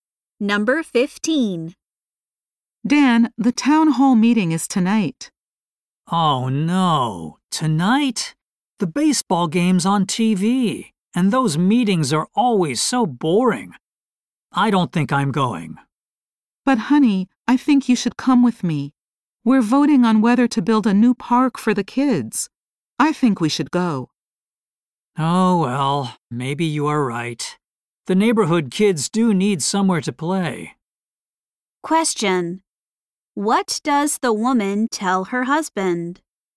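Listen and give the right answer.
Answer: He should go to the town hall meeting with her.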